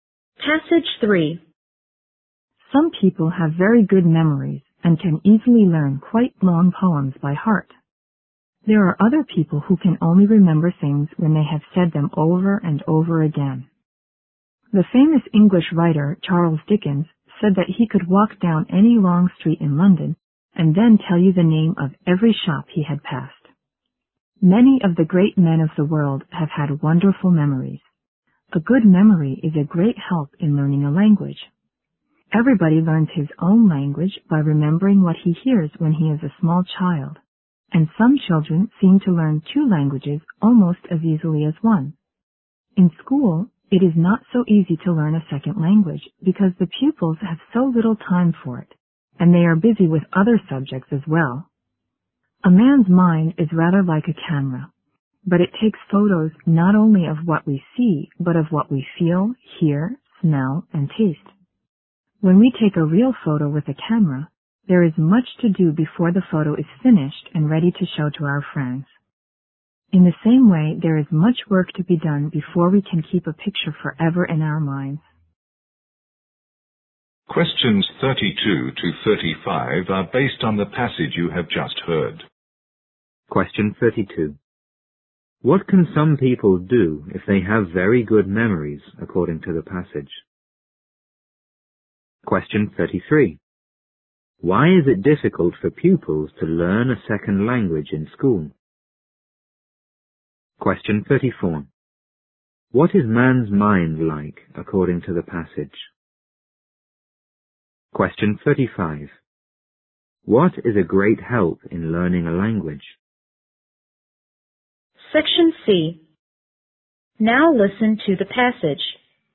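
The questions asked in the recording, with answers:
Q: What can some people do if they have very good memories, according to the passage?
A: Easily learn quite long poems by heart

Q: Why is it difficult for pupils to learn a second language in school?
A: They have little time for it and are busy with other subjects

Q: What is man's mind like, according to the passage?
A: A camera

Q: What is a great help in learning a language?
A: A good memory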